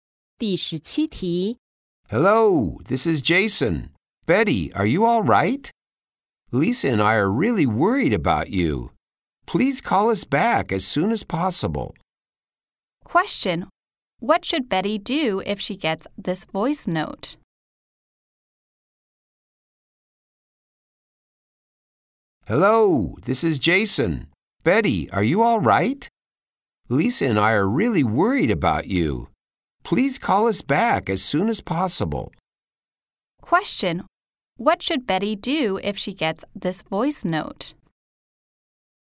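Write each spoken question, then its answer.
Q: What should Betty do if she gets this voice note?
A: Call Jason and Lisa back as soon as possible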